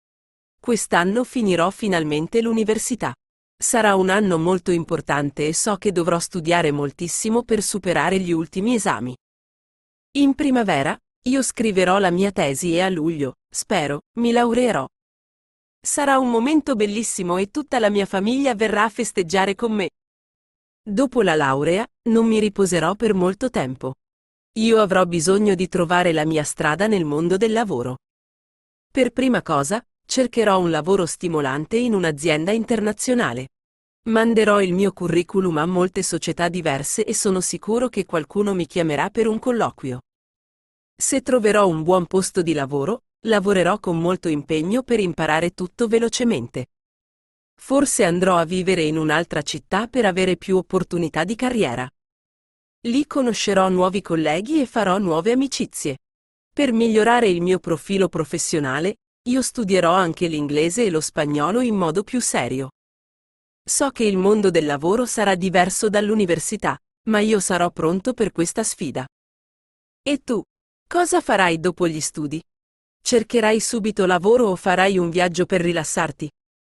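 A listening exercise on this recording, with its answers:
Ascolta e inserisci i verbi mancanti.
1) un anno molto importante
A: Sarà

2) so che studiare moltissimo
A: dovrò

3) io la mia tesi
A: scriverò

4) a luglio, spero, mi .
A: laureerò

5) tutta la mia famiglia a festeggiare con me!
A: verrà

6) Dopo la laurea, non per molto tempo.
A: mi riposerò

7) Io bisogno di trovare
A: avrò

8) Per prima cosa, un lavoro stimolante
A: cercherò

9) il mio curriculum a molte società diverse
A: Manderò

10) qualcuno mi per un colloquio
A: chiamerà

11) Se un buon posto di lavoro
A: troverò

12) con molto impegno per imparare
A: lavorerò

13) Forse a vivere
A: andrò

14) Lì nuovi colleghi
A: conoscerò

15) colleghi e nuove amicizie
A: farò

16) io anche l'inglese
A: studierò

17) il mondo del lavoro diverso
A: sarà

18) ma io pronto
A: sarò

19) Cosa dopo gli studi?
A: farai

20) subito lavoro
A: Cercherai

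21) o un viaggio per rilassarti?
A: farai

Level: Livello A2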